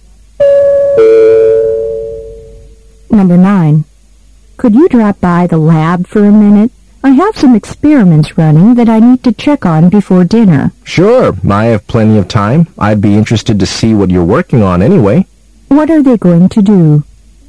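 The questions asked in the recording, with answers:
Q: What are they going to do?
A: Go to the lab to check on experiments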